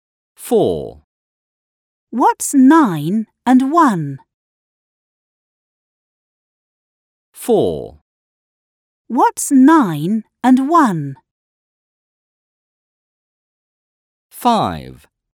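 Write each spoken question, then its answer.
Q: What's 9 and 1?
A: 10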